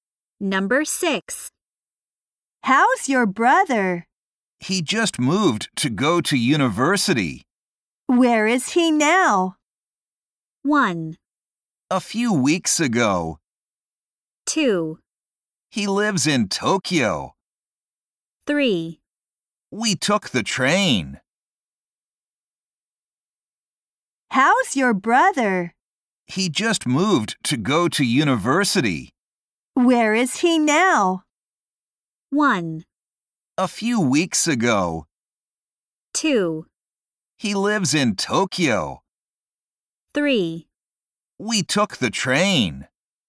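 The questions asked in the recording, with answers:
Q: Where is he now?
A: 2: He lives in Tokyo.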